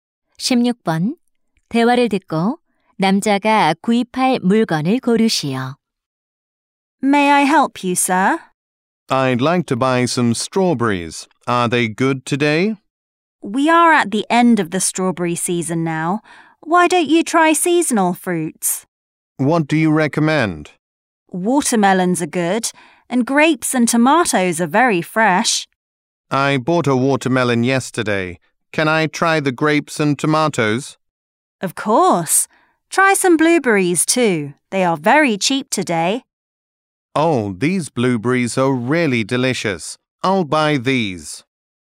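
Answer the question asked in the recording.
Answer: 블루베리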